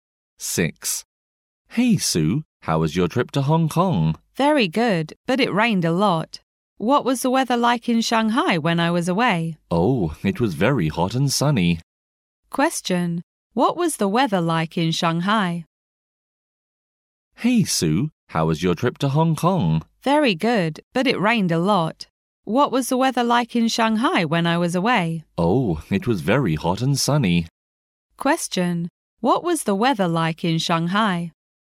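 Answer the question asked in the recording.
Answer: It was very hot and sunny.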